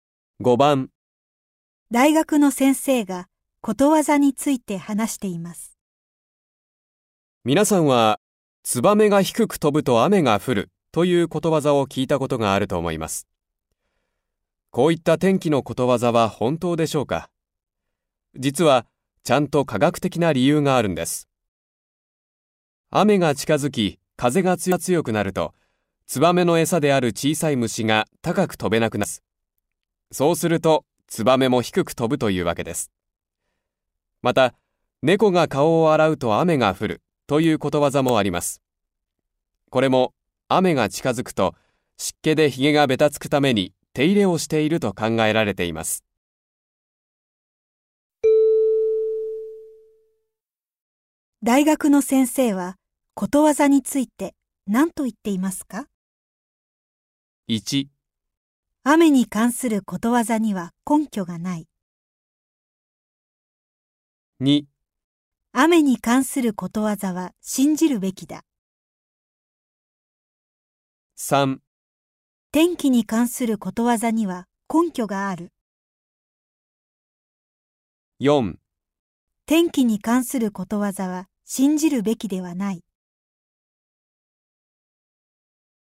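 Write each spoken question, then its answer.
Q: 大学の先生はことわざについて何と言っていますか?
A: 3: 天気に関することわざには根拠がある。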